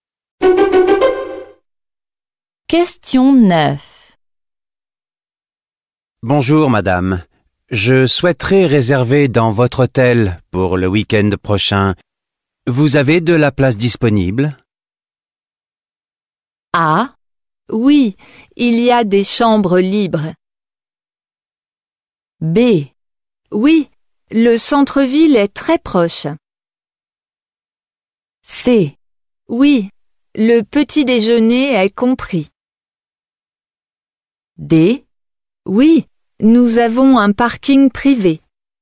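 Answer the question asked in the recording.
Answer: A: Oui, il y a des chambres libres.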